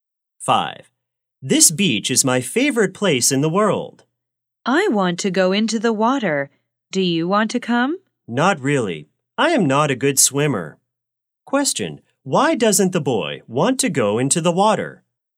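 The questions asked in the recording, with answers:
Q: Question, why doesn't the boy want to go into the water?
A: He is not a good swimmer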